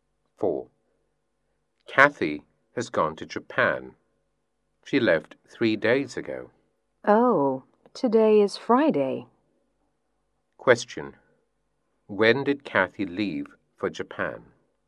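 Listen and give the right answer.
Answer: On Tuesday (3 days ago)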